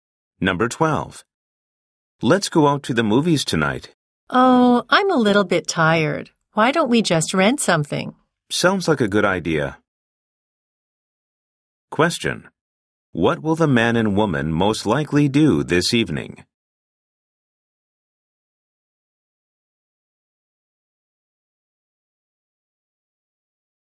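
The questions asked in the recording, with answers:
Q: What will the man and woman most likely do this evening?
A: Rent a movie and watch it at home.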